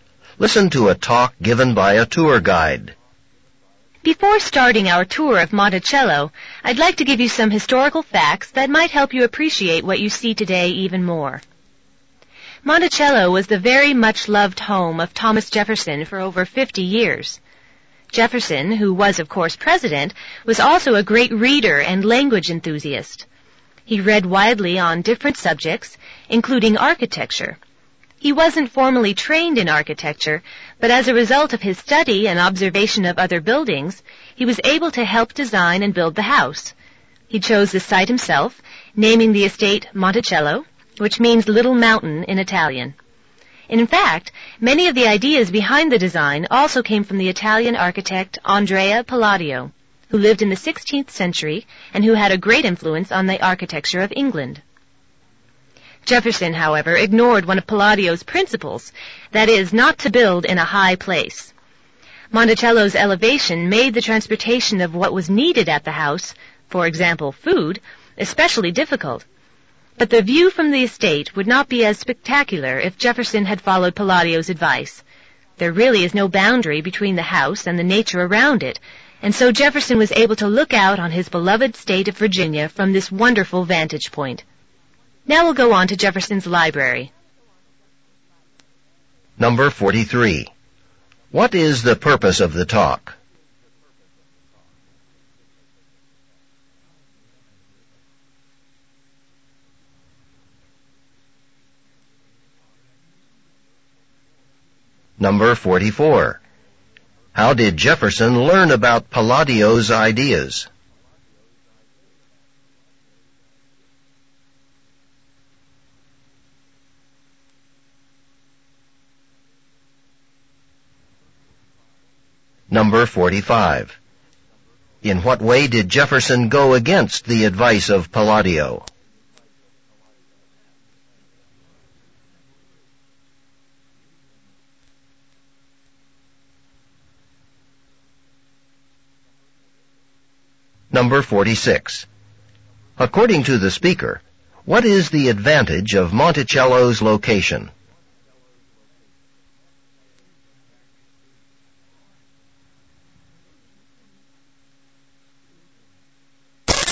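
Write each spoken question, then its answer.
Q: What is the purpose of the talk?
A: To give historical background on Monticello before the tour

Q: In what way did Jefferson go against the advice of Palladio?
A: He built the house in a high place

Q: According to the speaker, what is the advantage of Monticello's location?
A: It has a spectacular view of Virginia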